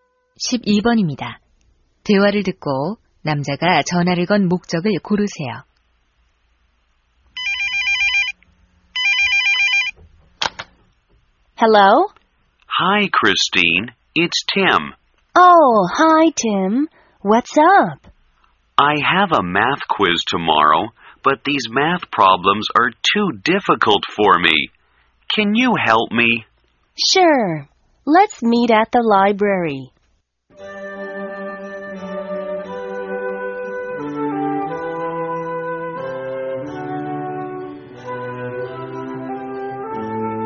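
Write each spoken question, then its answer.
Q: 대화를 듣고 남자가 전화를 건 목적을 고르세요.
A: 수학 문제 도움 요청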